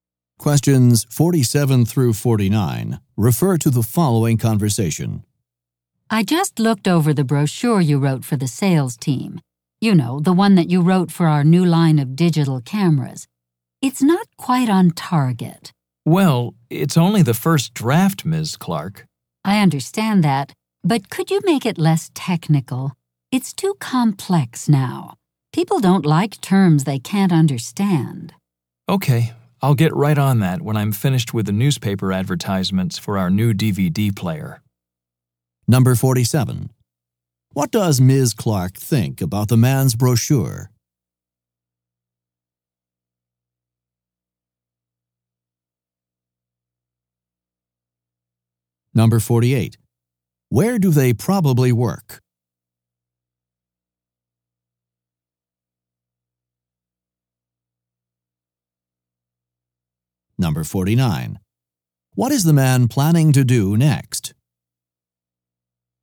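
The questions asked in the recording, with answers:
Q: What does Ms. Clark think about the man's brochure?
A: It is too technical

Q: What is the man planning to do next?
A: Finish the newspaper ads for the DVD player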